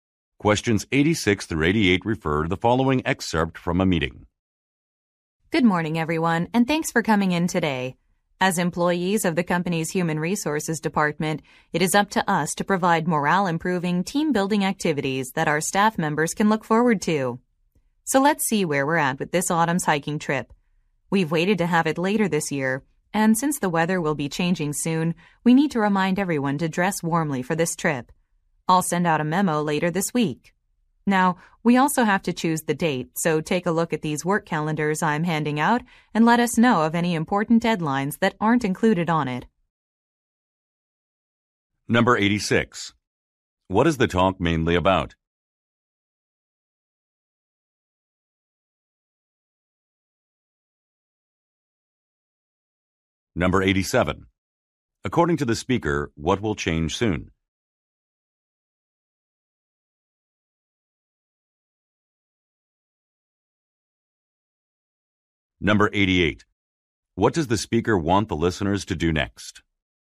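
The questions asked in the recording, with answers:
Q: What is the talk mainly about?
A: A company hiking trip

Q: According to the speaker, what will change soon?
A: The weather

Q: What does the speaker want the listeners to do next?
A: Review work calendars for deadlines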